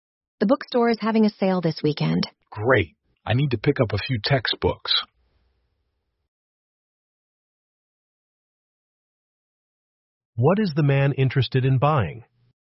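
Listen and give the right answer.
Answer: Textbooks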